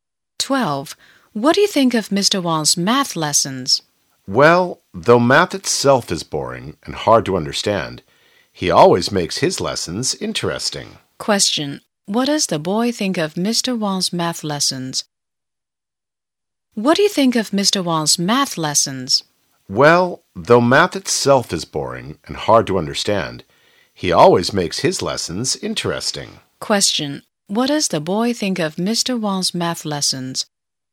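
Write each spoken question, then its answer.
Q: What does the boy think of Mr. Wang's math lessons?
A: They are interesting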